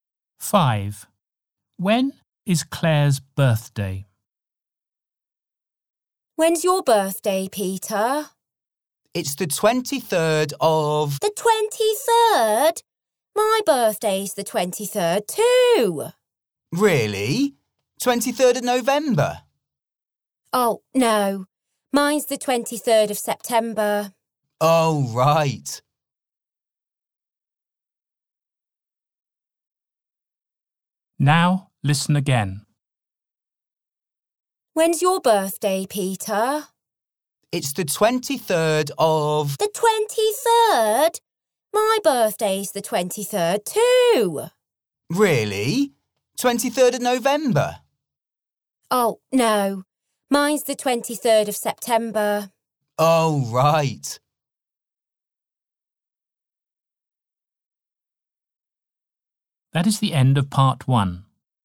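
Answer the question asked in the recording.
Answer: 23rd of September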